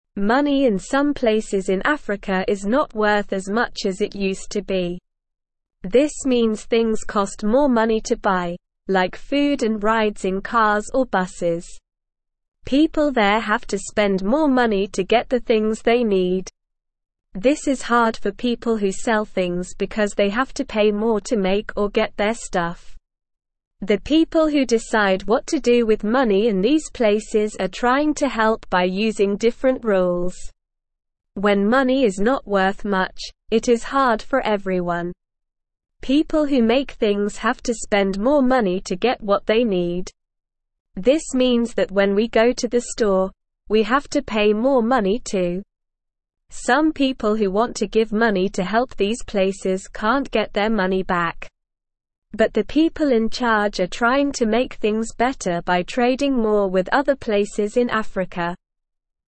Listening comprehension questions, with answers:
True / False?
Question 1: People who make things have to spend more money to get what they need.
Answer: True

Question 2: When money is worth much, it is easy for everyone.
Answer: False

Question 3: This means that things like food and rides in cars or buses cost less money.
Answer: False

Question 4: In some places in Africa, money is not worth as much as before.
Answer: True

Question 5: The people in charge are trying to help by using different rules with money.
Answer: True

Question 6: The people in charge are trying to make things worse by trading less with other places in Africa.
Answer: False

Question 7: It is easy for people who sell things because they have to pay less to make or get their stuff.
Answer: False

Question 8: People have to spend more money to get the things they need.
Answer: True

Listen and Fill in the Gaps:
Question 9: This means things cost more (1)______ to buy, like food and rides in cars or buses.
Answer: money

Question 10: People there (2)______ to spend more money to get the things they (3)______.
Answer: have

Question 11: People there (2)______ to spend more money to get the things they (3)______.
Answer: need

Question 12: This is hard for people who sell things because they have to pay (4)______ to make or get their stuff.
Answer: more

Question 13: The people who decide what to do with money in these places are trying to help by using different (5)______.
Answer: rules

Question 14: When money is not (6)______ much, it is hard for everyone.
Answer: worth

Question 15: Some people who want to give money to help these (7)______ can't get their money back.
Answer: places

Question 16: But the people in charge are trying to make things better by trading more with (8)______ places in Africa.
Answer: other

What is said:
Money in some places in Africa is not worth as much as it used to be. This means things cost more money to buy, like food and rides in cars or buses. People there have to spend more money to get the things they need. This is hard for people who sell things because they have to pay more to make or get their stuff. The people who decide what to do with money in these places are trying to help by using different rules.
When money is not worth much, it is hard for everyone. This means that when we go to the store, we have to pay more money too. Some people who want to give money to help these places can't get their money back. But the people in charge are trying to make things better by trading more with other places in Africa.

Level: Level 1